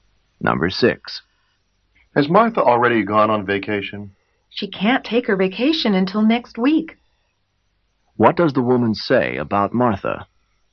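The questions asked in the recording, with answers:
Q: What does the woman say about Martha?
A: She hasn't gone on vacation yet; she goes next week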